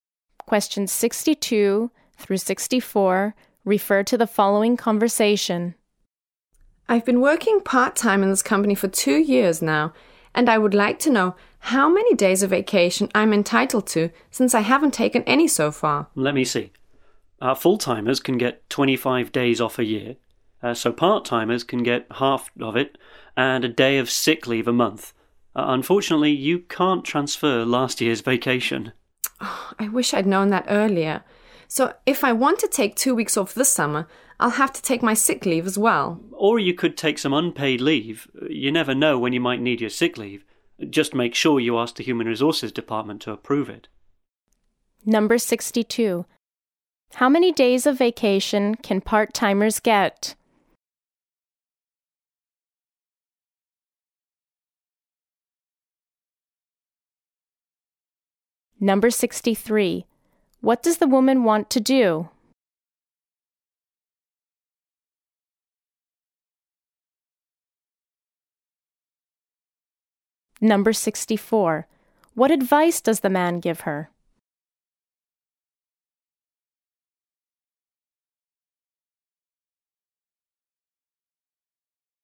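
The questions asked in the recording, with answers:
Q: How many days of vacation can part-timers get?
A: 12.5 days a year (half of 25)

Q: What does the woman want to do?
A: Take 2 weeks off this summer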